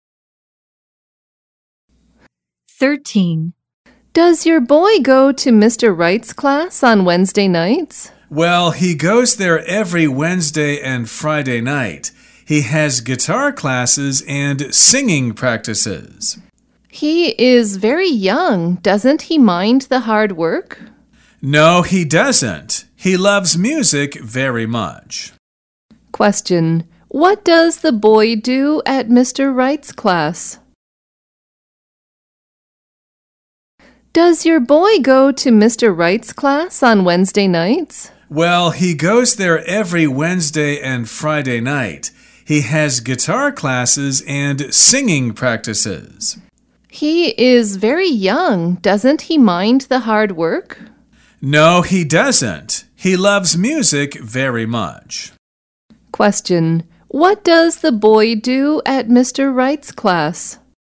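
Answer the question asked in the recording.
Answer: He has guitar classes and singing practices.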